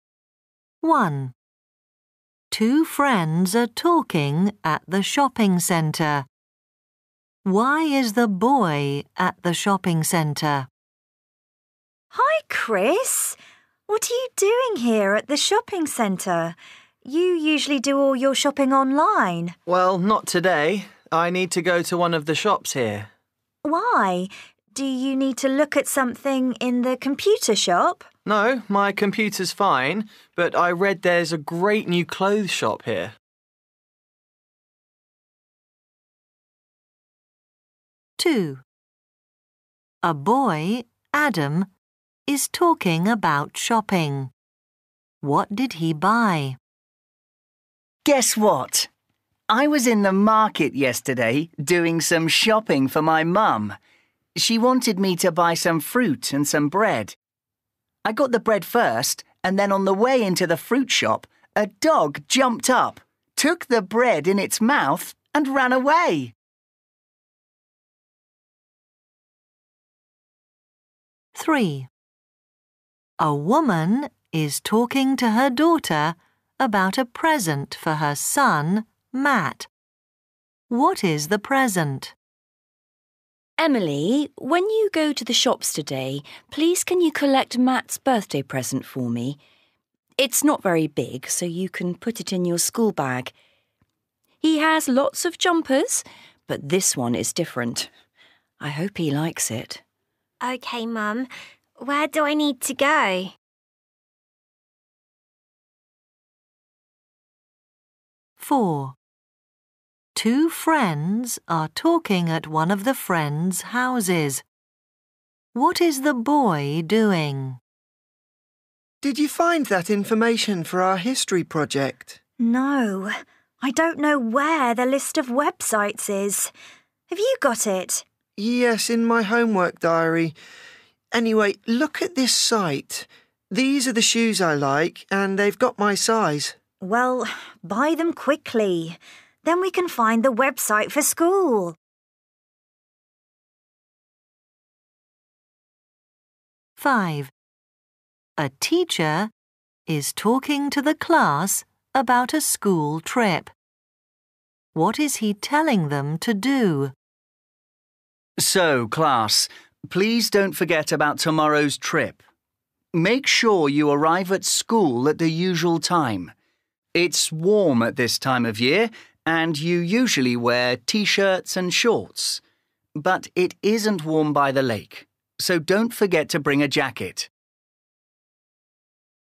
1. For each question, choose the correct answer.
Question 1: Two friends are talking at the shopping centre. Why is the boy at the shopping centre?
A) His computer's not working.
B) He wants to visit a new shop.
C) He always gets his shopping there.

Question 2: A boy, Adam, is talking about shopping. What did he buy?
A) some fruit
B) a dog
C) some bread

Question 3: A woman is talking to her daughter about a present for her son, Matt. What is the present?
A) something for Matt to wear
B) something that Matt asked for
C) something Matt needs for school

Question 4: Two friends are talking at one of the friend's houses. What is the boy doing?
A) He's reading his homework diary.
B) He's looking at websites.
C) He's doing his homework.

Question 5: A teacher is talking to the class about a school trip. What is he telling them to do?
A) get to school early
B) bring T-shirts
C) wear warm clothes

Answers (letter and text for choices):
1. B) He wants to visit a new shop.
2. C) some bread
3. A) something for Matt to wear
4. B) He's looking at websites.
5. C) wear warm clothes

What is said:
1 Two friends are talking at the shopping centre. Why is the boy at the shopping centre?
Girl 1: Hi, Chris. What are you doing here at the shopping centre? You usually do all your shopping online.
Chris: Well, not today. I need to go to one of the shops here.
Girl 1: Why? Do you need to look at something in the computer shop?
Chris: No. My computer's fine, but I read there's a great new clothes shop here.
2 A boy, Adam, is talking about shopping. What did he buy?
Adam: Guess what? I was in the market yesterday doing some shopping for my mum. She wanted me to buy some fruit and some bread. I got the bread first and then on the way into the fruit shop, a dog jumped up, took the bread in its mouth and ran away!
3 A woman is talking to her daughter about a present for her son, Matt. What is the present?
Mum: Emily, when you go to the shops today, please can you collect Matt's birthday present for me? It's not very big, so you can put it in your school bag. He has lots of jumpers, but this one is different. I hope he likes it.
Emily: OK Mum. Where do I need to go?
4 Two friends are talking at one of the friend's houses. What is the boy doing?
Boy: Did you find that information for our history project?
Girl: No, I don't know where the list of websites is. Have you got it?
Boy: Yes, in my homework diary. Anyway, look at this site. These are the shoes I like. And they've got my size.
Girl: Well, buy them quickly. Then we can find the website for school.
5 A teacher is talking to the class about a school trip. What is he telling them to do?
Teacher: So, class, please don't forget about tomorrow's trip. Make sure you arrive at school at the usual time. It's warm at this time of year and you usually wear T-shirts and shorts, but it isn't warm by the lake so don't forget to bring a jacket.